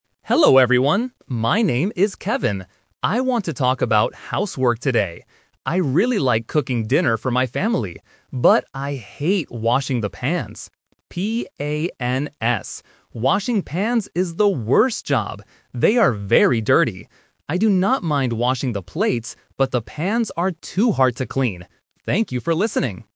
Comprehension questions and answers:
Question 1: What does Kevin like doing?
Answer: Cooking dinner

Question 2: What word does Kevin spell?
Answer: P-A-N-S

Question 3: What does Kevin hate washing?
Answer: The pans

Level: A1